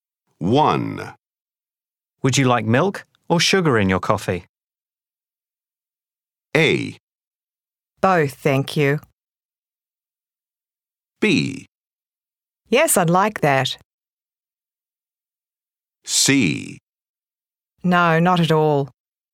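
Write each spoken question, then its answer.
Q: Would you like milk or sugar in your coffee?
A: A: Both, thank you.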